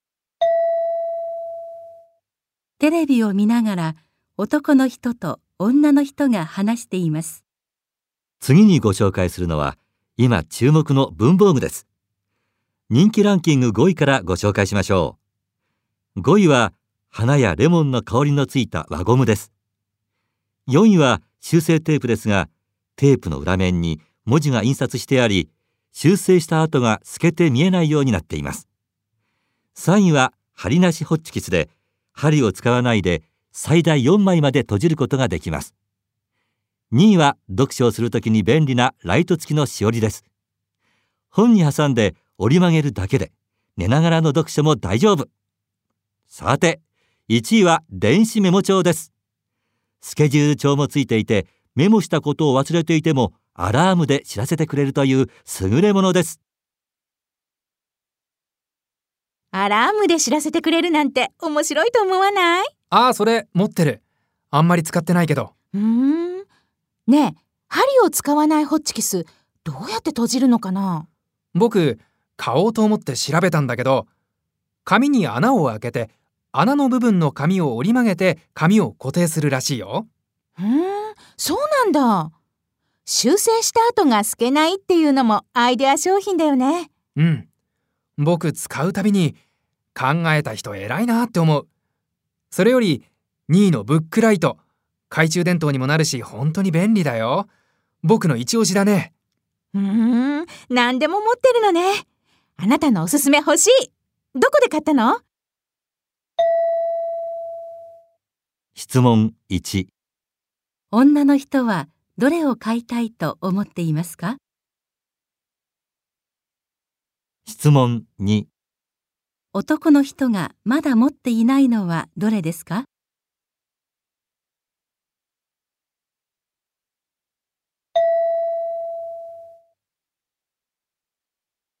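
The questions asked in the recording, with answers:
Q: 女の人はどれを買いたいと思っていますか?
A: ライト付きのしおり

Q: 男の人がまだ持っていないのはどれですか?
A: 針なしホッチキス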